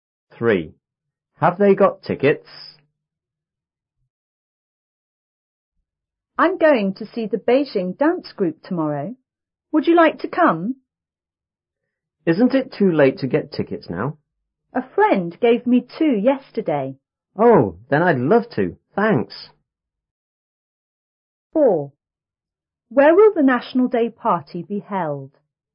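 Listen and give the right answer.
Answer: Yes, a friend gave two.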